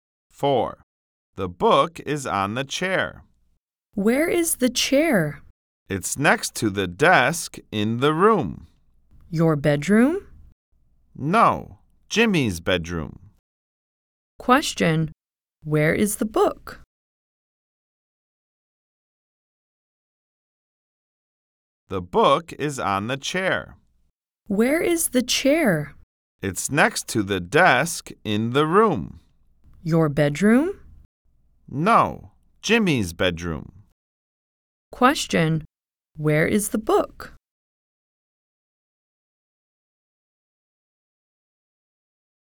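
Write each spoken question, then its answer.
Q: where is the book?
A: On the chair in Jimmy's bedroom.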